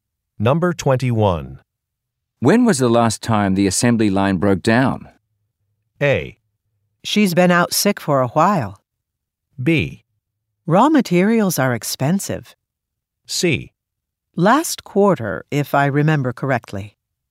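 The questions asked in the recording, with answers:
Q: When was the last time the assembly line broke down?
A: C: Last quarter, if I remember correctly.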